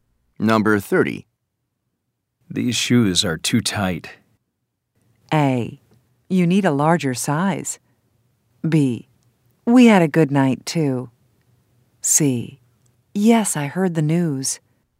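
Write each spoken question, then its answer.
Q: These shoes are too tight.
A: A: You need a larger size.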